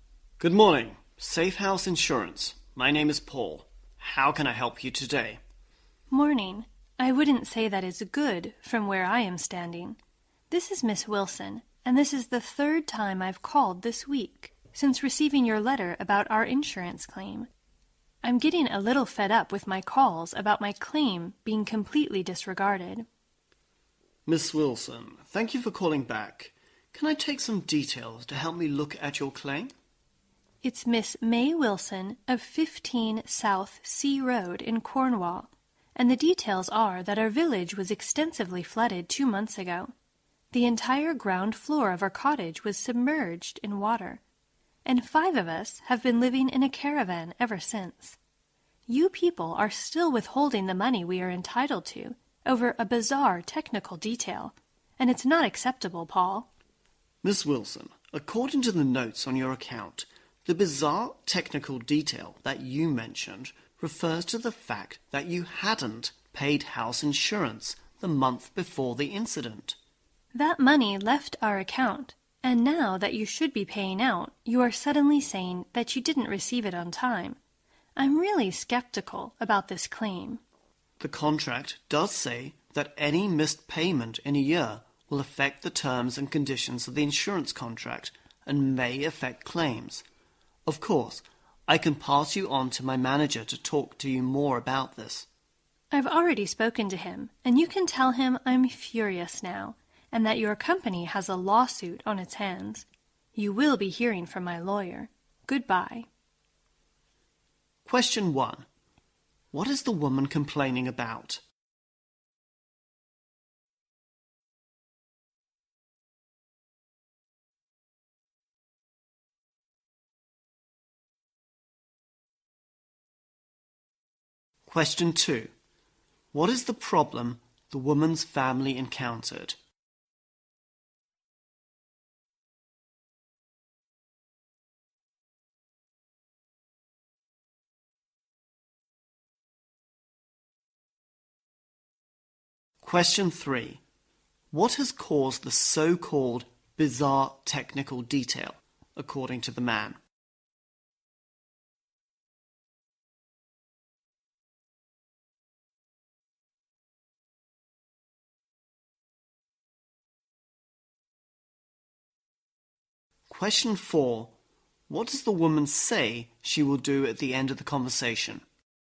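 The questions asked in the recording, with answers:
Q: What is the woman complaining about?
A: Her calls about her insurance claim being disregarded and the money being withheld

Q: What is the problem the woman's family encountered?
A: Their village was flooded and their cottage's ground floor was submerged, so they live in a caravan

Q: What has caused the so-called bizarre technical detail, according to the man?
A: She hadn't paid the house insurance the month before the incident

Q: What does the woman say she will do at the end of the conversation?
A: Take legal action through her lawyer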